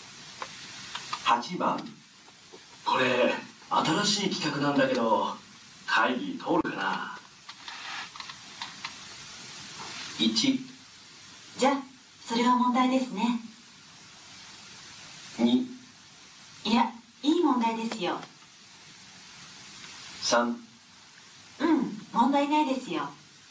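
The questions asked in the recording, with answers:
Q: これ新しい企画なんだけど会議通るかな。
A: 3: うん、問題ないですよ。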